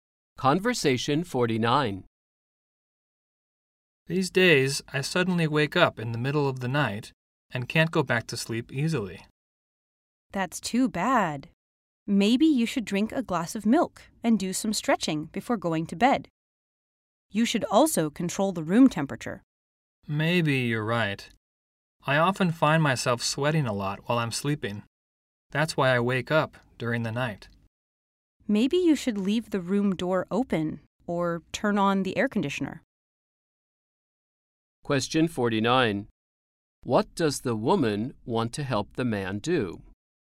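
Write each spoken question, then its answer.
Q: What does the woman want to help the man do?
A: Sleep through the night without waking up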